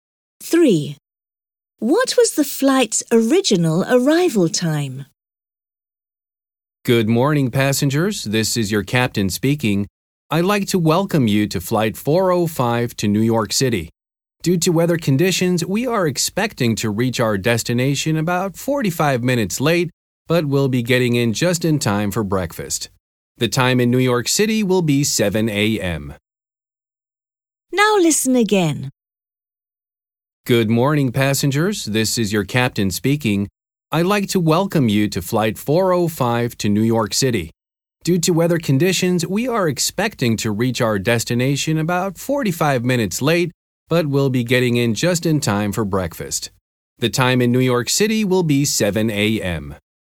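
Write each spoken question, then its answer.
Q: What was the flight's original arrival time?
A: 6:15 a.m.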